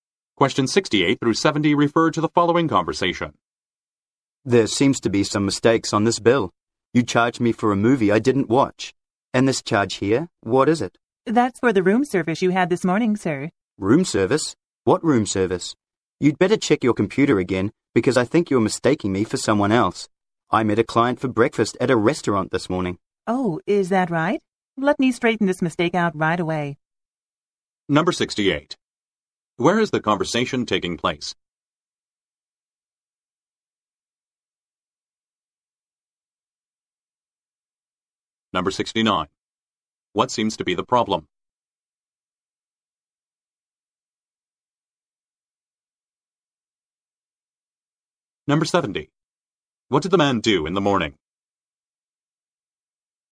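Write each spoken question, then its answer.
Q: Where is the conversation taking place?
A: At a hotel

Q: What seems to be the problem?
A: There are mistakes on the bill

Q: What did the man do in the morning?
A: Met a client for breakfast at a restaurant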